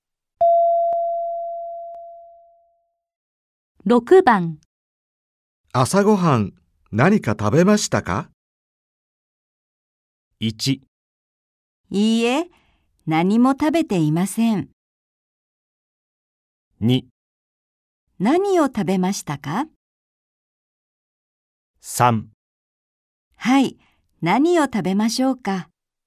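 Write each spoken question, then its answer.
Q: 朝ごはん、何か食べましたか?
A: 1: いいえ、何も食べていません。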